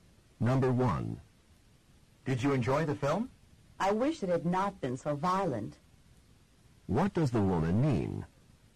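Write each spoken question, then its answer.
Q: What does the woman mean?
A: The film was violent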